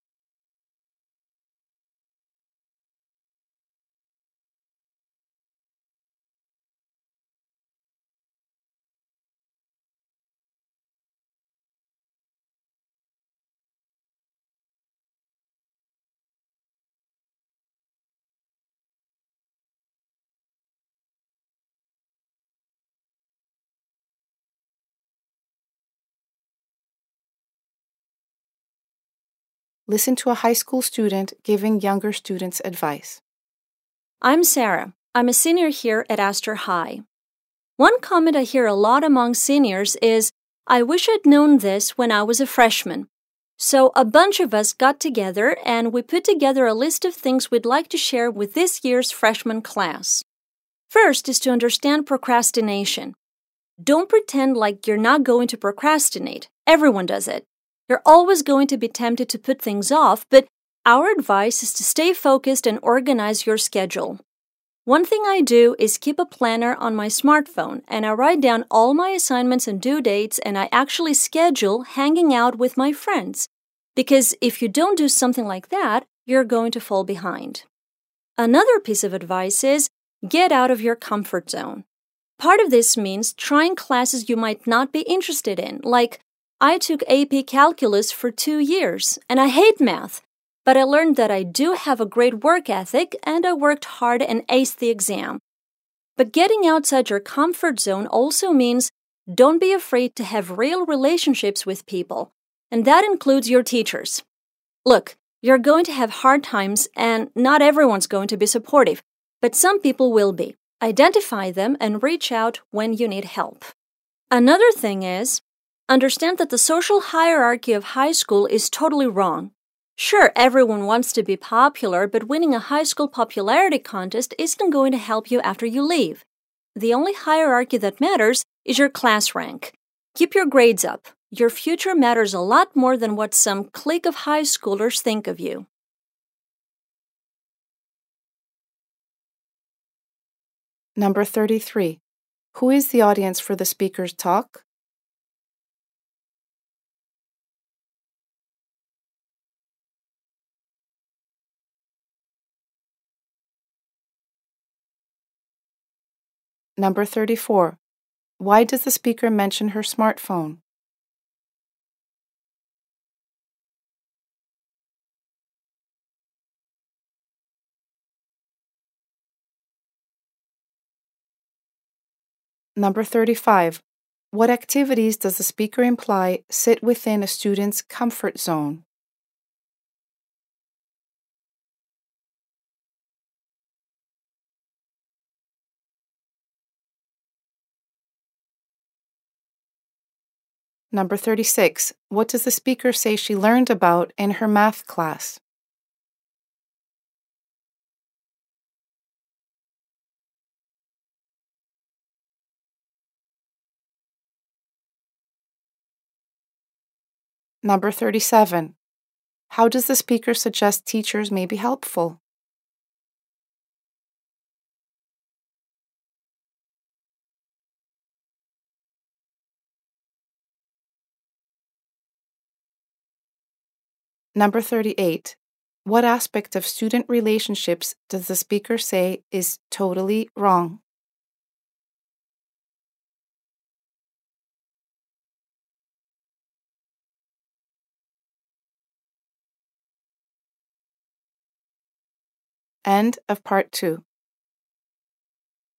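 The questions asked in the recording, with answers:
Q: Who is the audience for the speaker's talk?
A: This year's freshman class

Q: Why does the speaker mention her smartphone?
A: She keeps a planner on it to organize her schedule and avoid procrastinating

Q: What does the speaker say she learned about in her math class?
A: That she has a great work ethic

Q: How does the speaker suggest teachers may be helpful?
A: They can offer support when you reach out for help in hard times

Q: What aspect of student relationships does the speaker say is totally wrong?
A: The social hierarchy of high school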